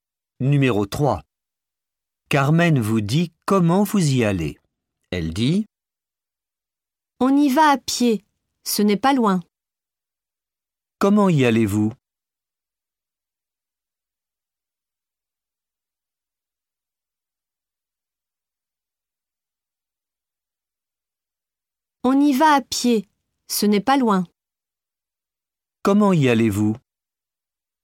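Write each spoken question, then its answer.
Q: Comment y allez-vous?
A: À pied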